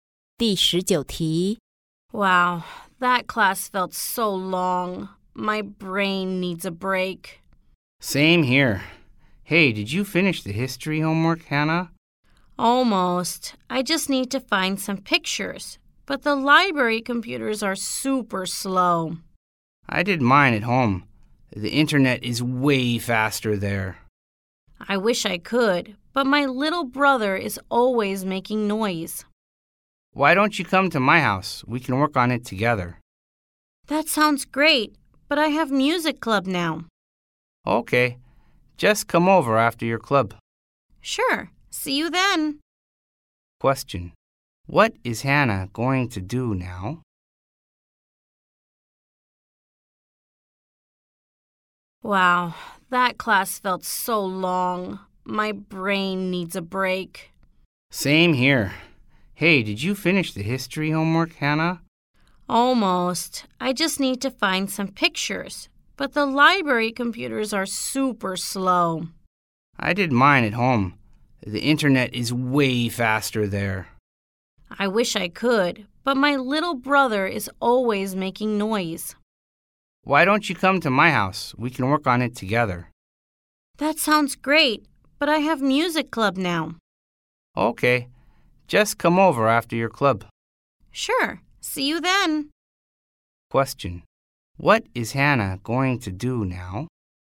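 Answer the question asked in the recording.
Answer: Go to music club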